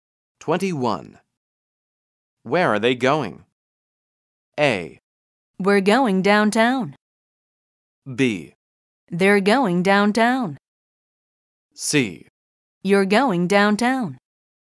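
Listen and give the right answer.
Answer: B: They're going downtown.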